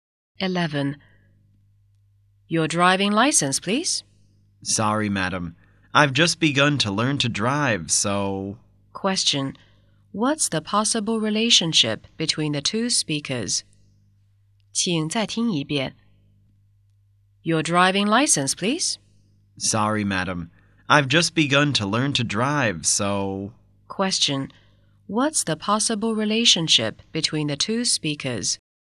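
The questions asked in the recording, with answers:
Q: What's the possible relationship between the two speakers?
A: Policewoman and driver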